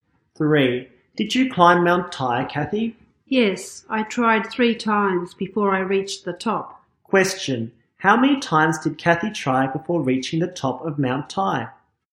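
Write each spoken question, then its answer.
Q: How many times did Kathy try before reaching the top of Mount Tai?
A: 3 times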